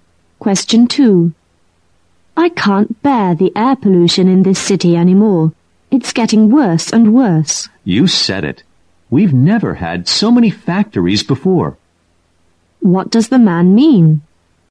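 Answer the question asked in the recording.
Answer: He agrees; the pollution is getting worse because there are more factories than ever.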